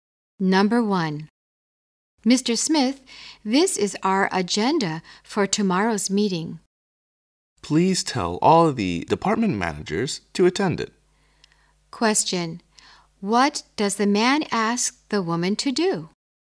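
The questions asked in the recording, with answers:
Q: What does the man ask the woman to do?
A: Tell all the department managers to attend tomorrow's meeting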